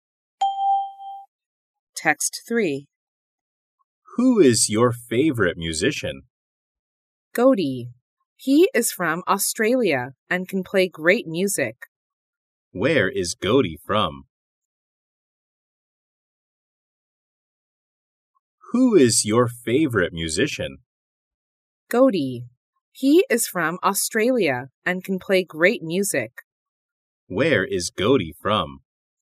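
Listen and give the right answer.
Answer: Australia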